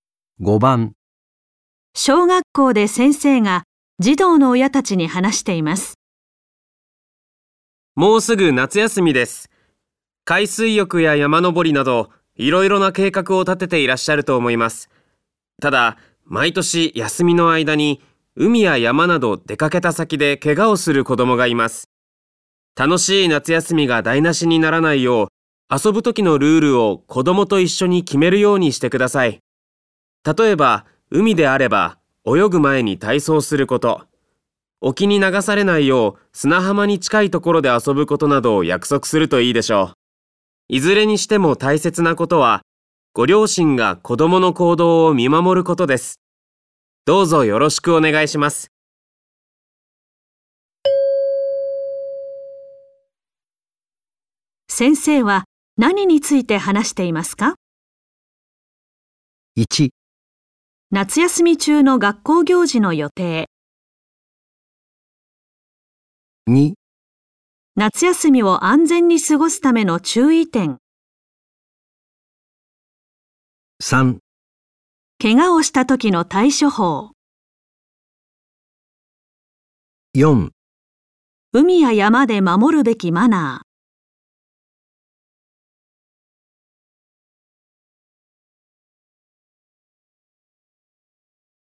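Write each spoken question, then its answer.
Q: 先生は何について話していますか?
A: 2: 夏休みを安全に過ごすための注意点。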